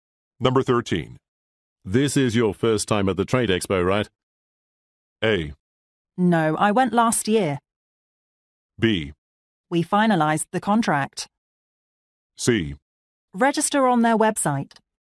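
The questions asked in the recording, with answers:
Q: This is your first time at the Trade Expo, right?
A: A: No, I went last year.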